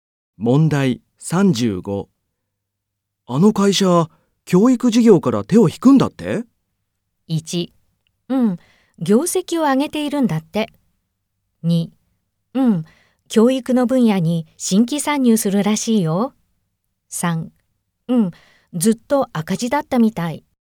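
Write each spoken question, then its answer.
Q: あの会社、教育事業から手を引くんだって?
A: 3: うん、ずっと赤字だったみたい。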